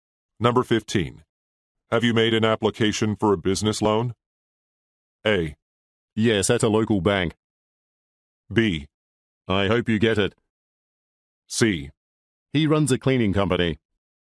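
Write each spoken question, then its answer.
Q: Have you made an application for a business loan?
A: A: Yes, at a local bank.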